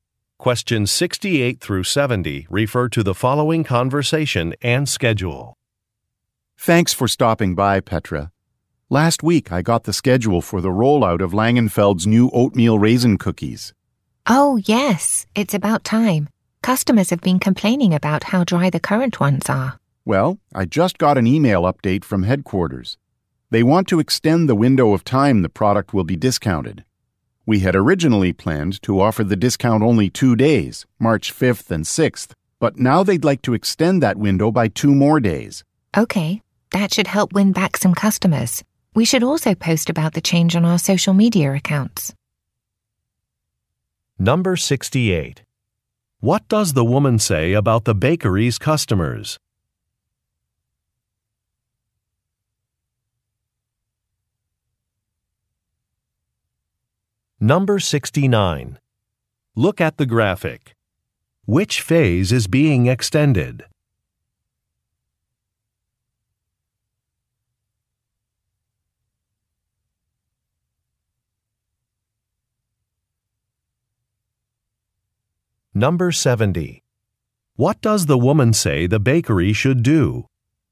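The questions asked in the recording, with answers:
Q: What does the woman say about the bakery's customers?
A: They complain the current cookies are dry

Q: What does the woman say the bakery should do?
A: Post about the change on social media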